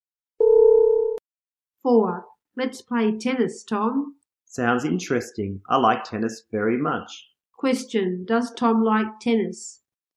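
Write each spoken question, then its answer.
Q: Does Tom like tennis?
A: Yes, he does.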